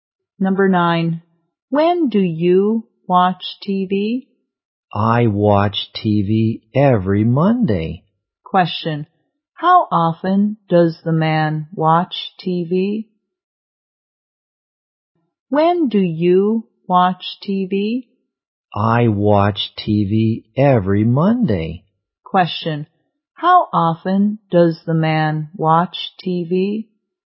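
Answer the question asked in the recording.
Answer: Once a week (every Monday)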